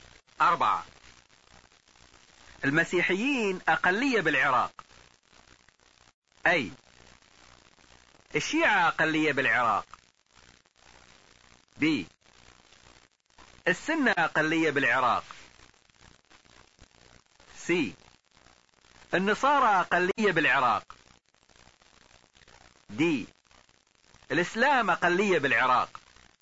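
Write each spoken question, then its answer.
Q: المسيحيين أقلية بالعراق.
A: س: النصارى أقلية بالعراق.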